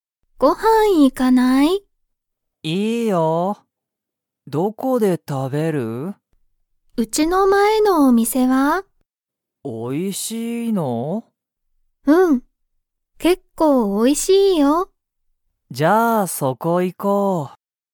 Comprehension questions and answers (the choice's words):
そのお店みせは、____。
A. まだ新あたらしい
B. 結構けっこう美味おいしい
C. もう新あたらしくない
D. 全然ぜんぜん美味おいしくない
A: 結構けっこう美味おいしい

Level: Level 1